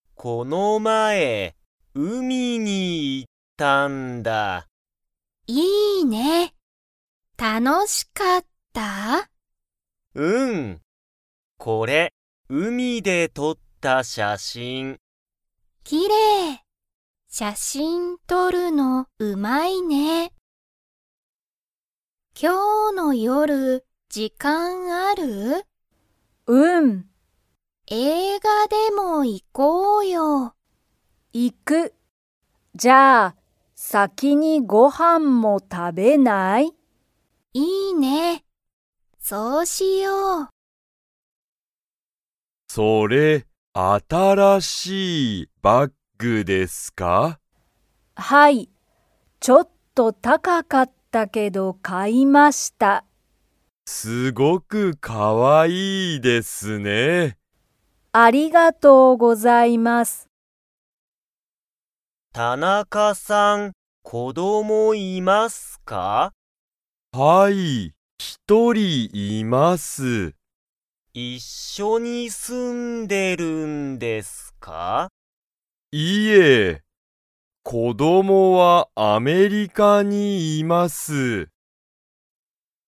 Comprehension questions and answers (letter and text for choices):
Comprehension Quiz (Skip if you don't understand the conversation yet)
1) ケンは、海(うみ)で写真(しゃしん)を撮(と)りましたか?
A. はい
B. いいえ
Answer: A. はい

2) カオリとヒロミは、先(さき)に____。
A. 映画(えいが)を観(み)る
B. 仕事(しごと)をする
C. 会社(かいしゃ)に行(い)く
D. ご飯(はん)を食(た)べる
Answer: D. ご飯(はん)を食(た)べる

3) 新(あたら)しいバッグは____。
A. あまりかわいくなかった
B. ちょっと高(たか)かった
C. 全然新(ぜんぜんあたら)しくなかった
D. すごく安(やす)かった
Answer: B. ちょっと高(たか)かった

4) 田中(たなか)さんは、子供(こども)と一緒(いっしょ)に住(す)んでいますか?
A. はい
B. いいえ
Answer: B. いいえ

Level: Level 1